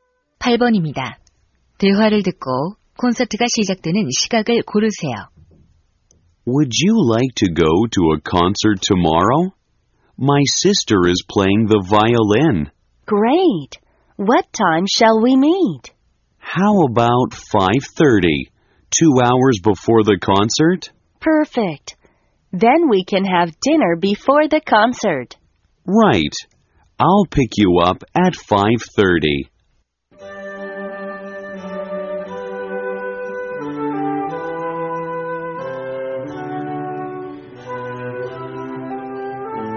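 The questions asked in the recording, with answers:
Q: 대화를 듣고 콘서트가 시작되는 시각을 고르세요.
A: 7시 30분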